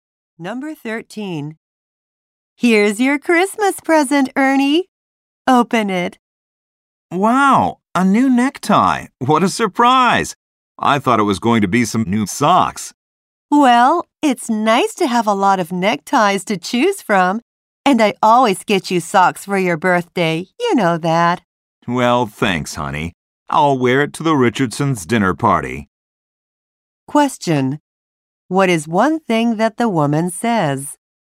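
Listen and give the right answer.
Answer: She always gives him socks for his birthday.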